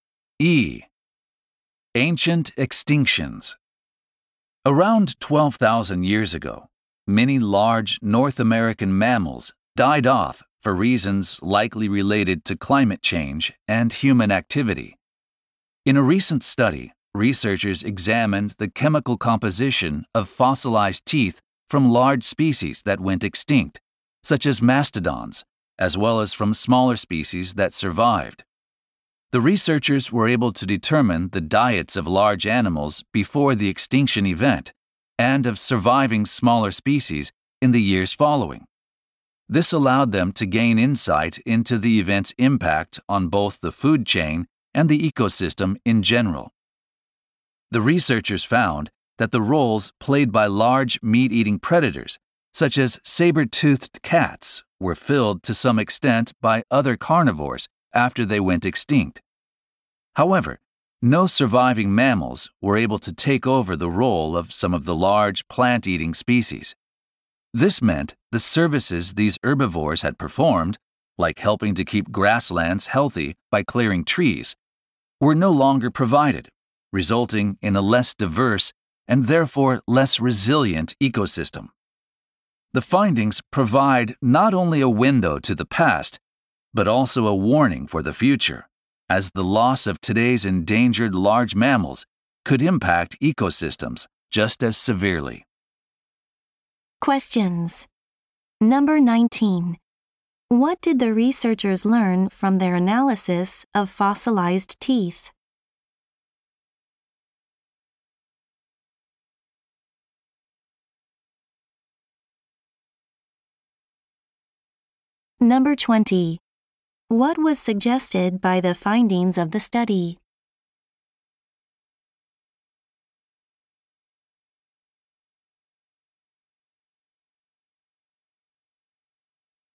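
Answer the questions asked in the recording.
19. No surviving mammals replaced some large plant-eaters' roles, though predators' roles were partly filled
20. Losing today's endangered large mammals could severely harm ecosystems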